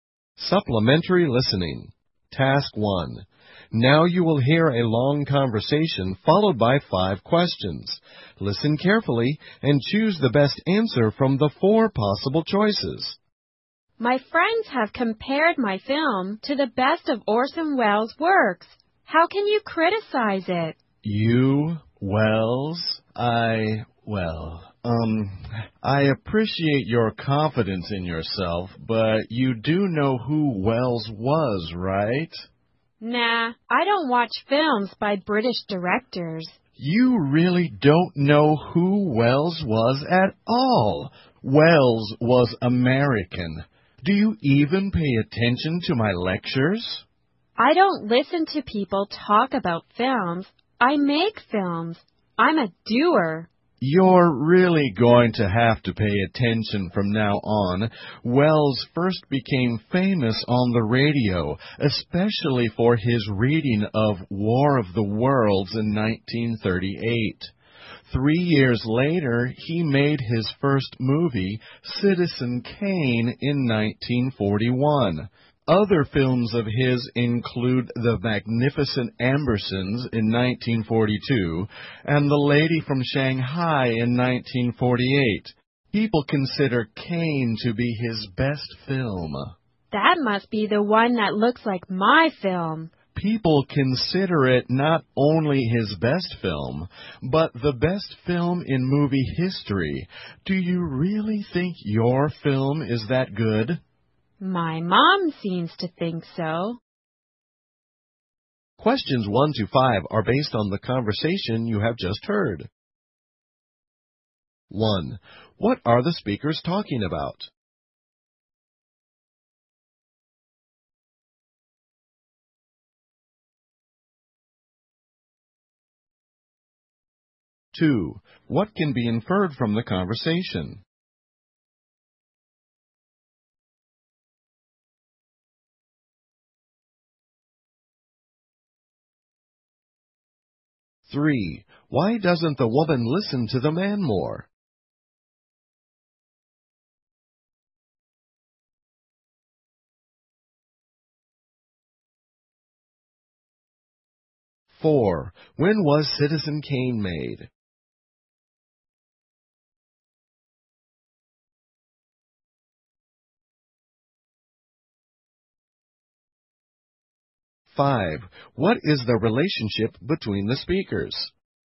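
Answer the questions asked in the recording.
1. The woman's film and Orson Welles
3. She makes films rather than listening to people talk about them
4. In 1941
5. Teacher and student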